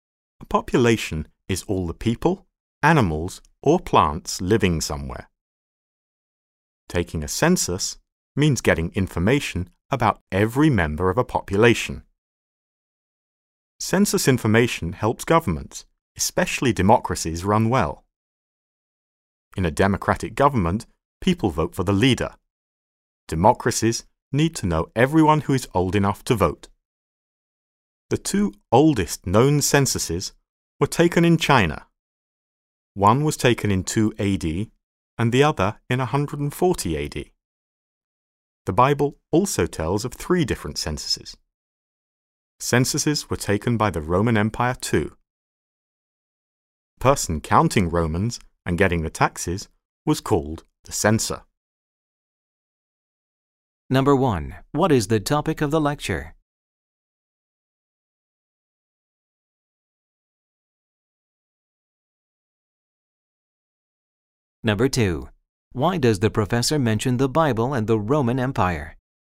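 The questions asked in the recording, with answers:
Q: What is the topic of the lecture?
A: Censuses (taking a census of a population)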